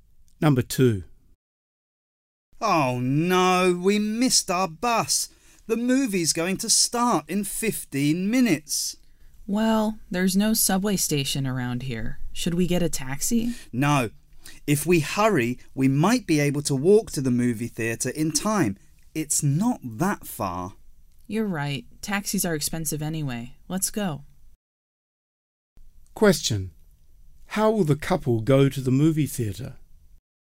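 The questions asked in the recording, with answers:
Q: How will the couple go to the movie theater?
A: They will walk.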